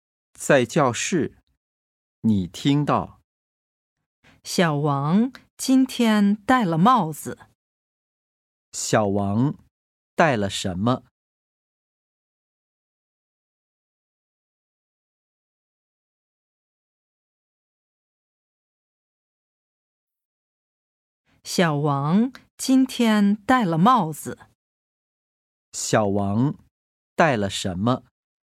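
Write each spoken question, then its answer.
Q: 小王戴了什么?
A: 帽子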